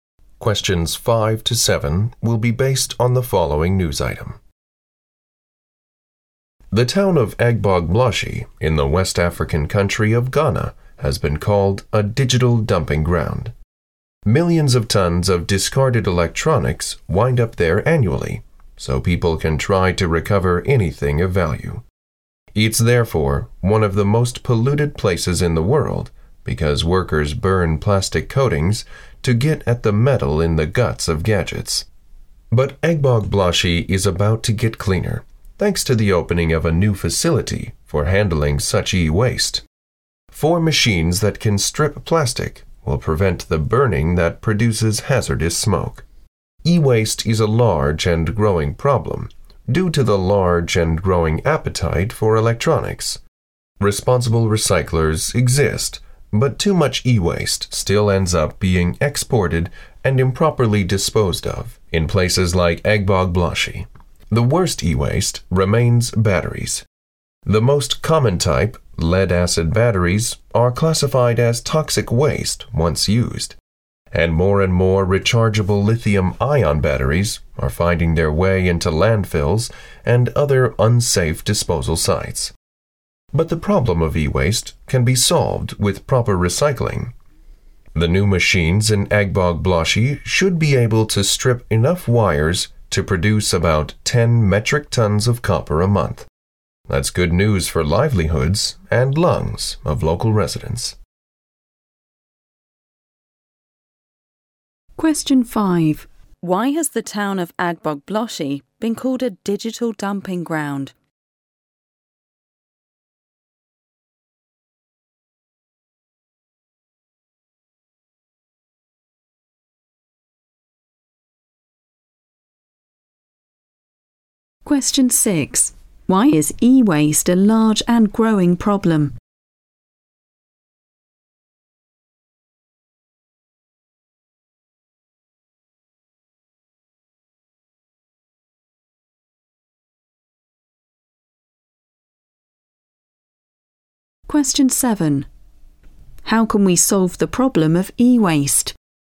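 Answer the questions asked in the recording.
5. Millions of tons of discarded electronics end up there every year
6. Because people want more and more electronics
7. With proper recycling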